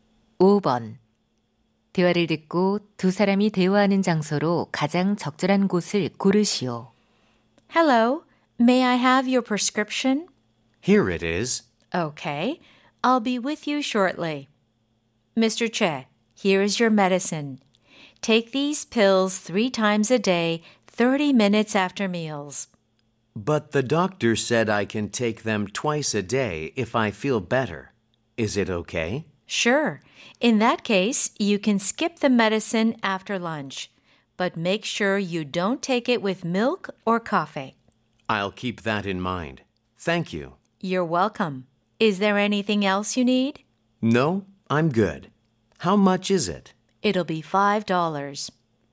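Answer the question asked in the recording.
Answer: 약국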